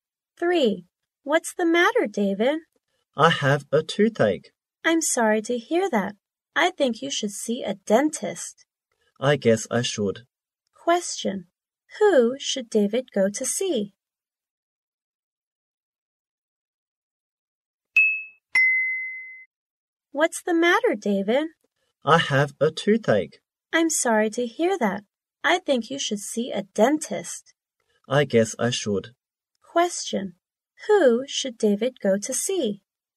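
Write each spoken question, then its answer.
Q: Who should David go to see?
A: A dentist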